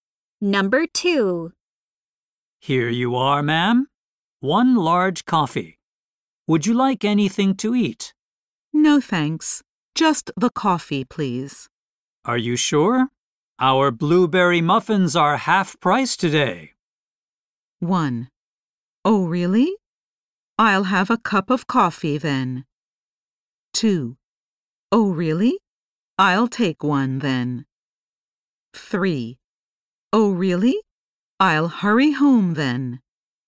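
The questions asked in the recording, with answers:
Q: Are you sure? Our blueberry muffins are half price today.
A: 2: Oh, really? I'll take one then.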